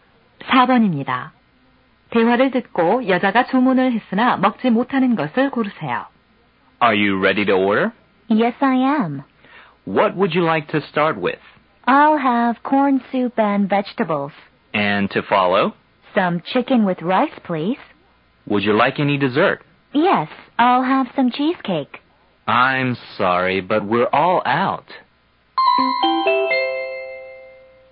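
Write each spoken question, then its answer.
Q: 대화를 듣고 여자가 주문을 했으나 먹지 못하는 것을 고르세요.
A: 치즈케이크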